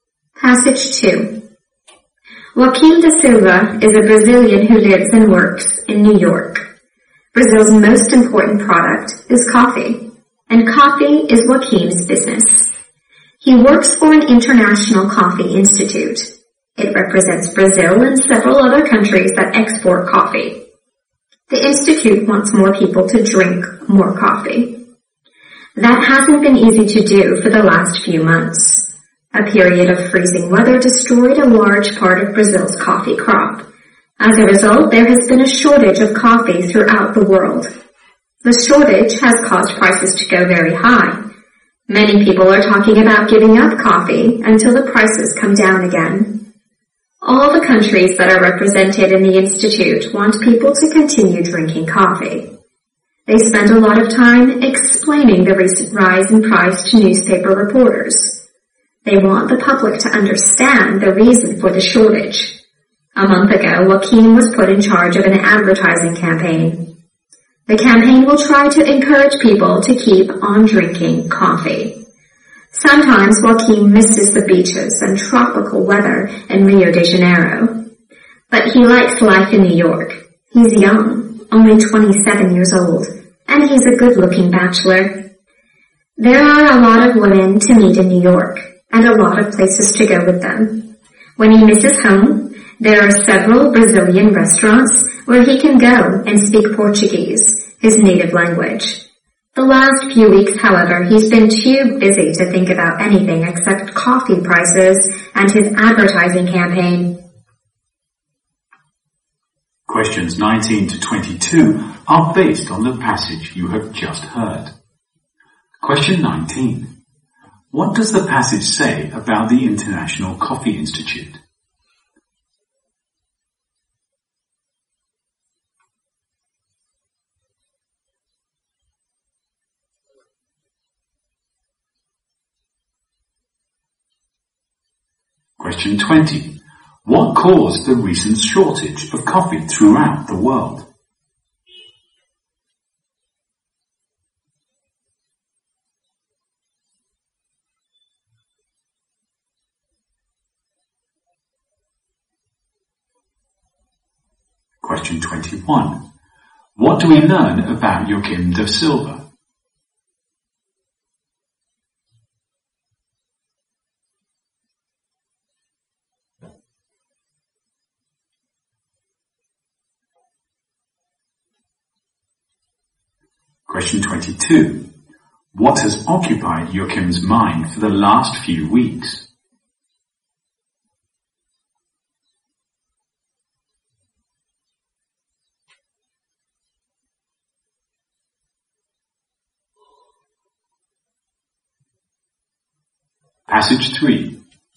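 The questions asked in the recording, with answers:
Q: What does the passage say about the International Coffee Institute?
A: It represents Brazil and other coffee-exporting countries and wants people to drink more coffee.

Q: What caused the recent shortage of coffee throughout the world?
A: Freezing weather destroyed much of Brazil's coffee crop.

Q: What do we learn about Joaquim da Silva?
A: He is a young Brazilian bachelor who enjoys life in New York.

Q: What has occupied Joaquim's mind for the last few weeks?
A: Coffee prices and his advertising campaign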